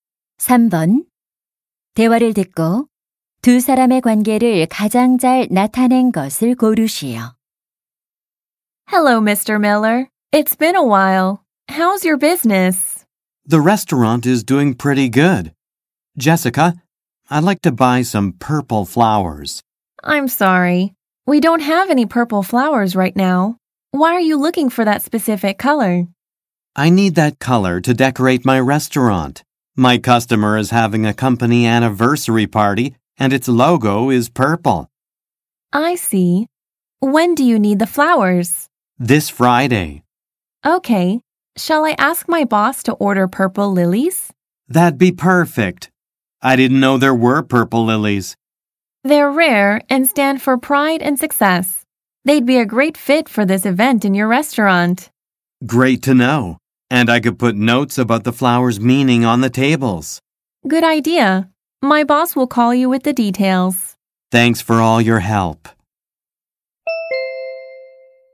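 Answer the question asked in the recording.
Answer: 식당 주인 - 꽃집 직원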